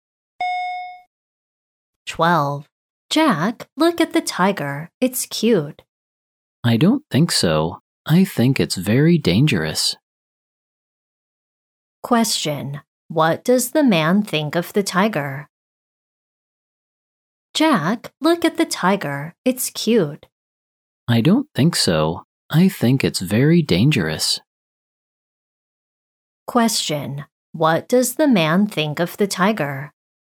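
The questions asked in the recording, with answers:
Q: Question. What does the man think of the tiger?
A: He thinks it's very dangerous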